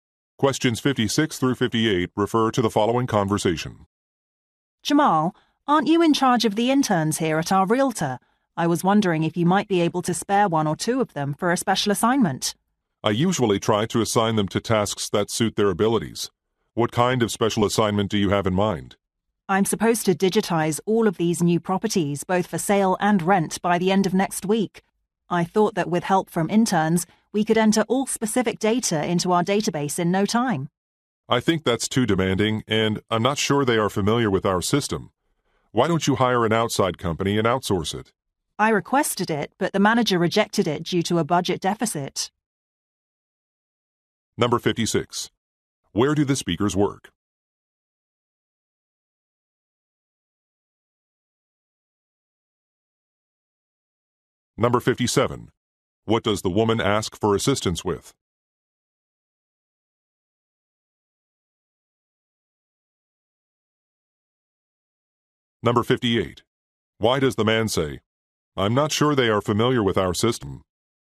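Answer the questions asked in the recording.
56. At a real estate agency
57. Entering property data into a database
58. To suggest the interns may not be suitable for the task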